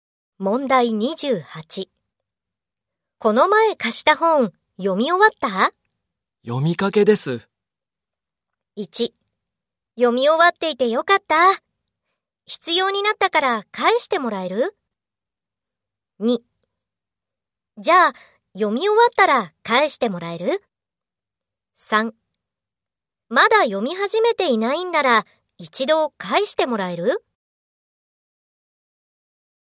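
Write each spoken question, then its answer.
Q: この前貸した本、読み終わった?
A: 2: じゃあ、読み終わったら返してもらえる?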